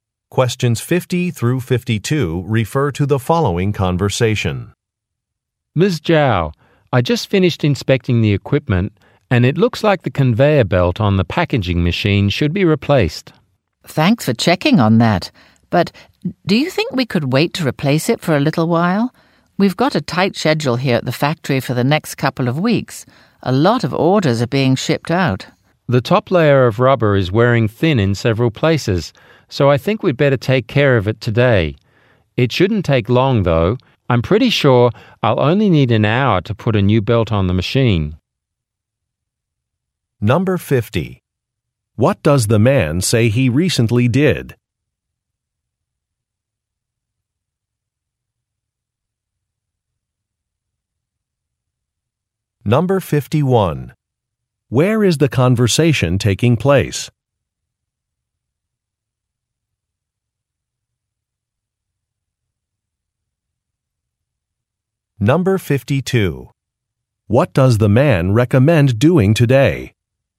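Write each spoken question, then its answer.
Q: What does the man say he recently did?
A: He inspected the equipment.

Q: Where is the conversation taking place?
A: At a factory.

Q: What does the man recommend doing today?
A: Replacing the conveyor belt on the packaging machine.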